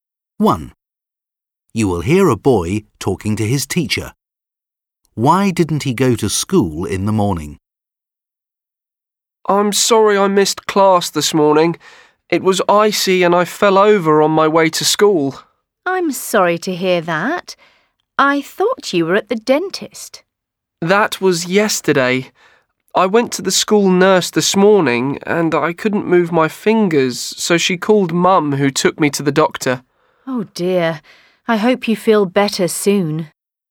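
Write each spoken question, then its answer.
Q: Why didn't he go to school in the morning?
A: He fell over on the ice and hurt his fingers, so he went to the doctor.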